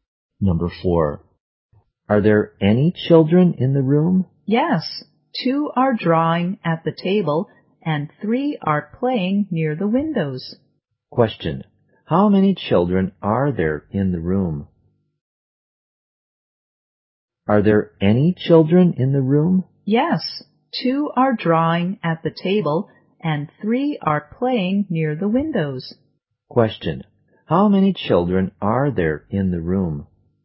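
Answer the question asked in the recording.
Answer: Five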